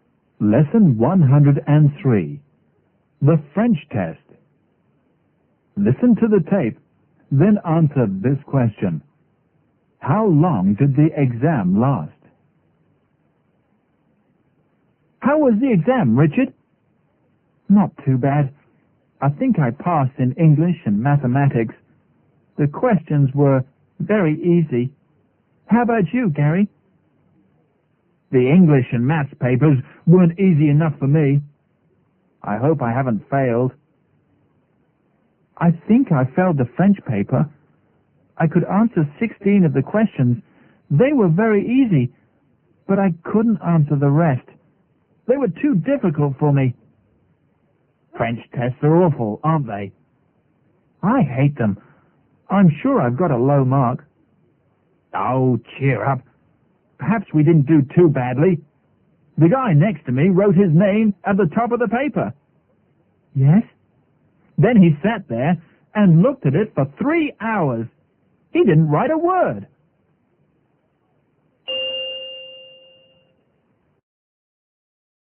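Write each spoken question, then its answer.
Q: How long did the exam last?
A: Three hours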